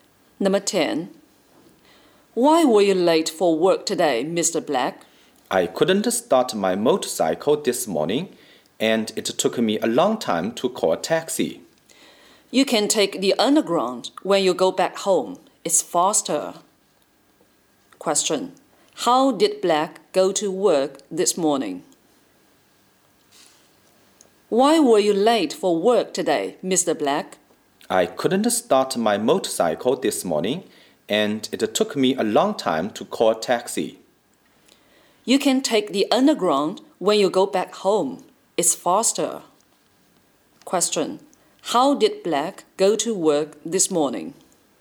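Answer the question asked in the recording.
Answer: By taxi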